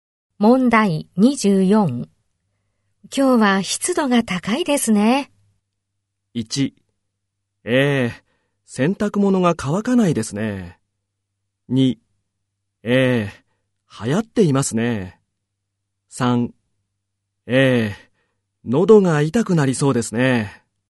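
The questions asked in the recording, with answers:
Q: 今日は湿度が高いですね。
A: 1: 洗濯物が乾かないですね。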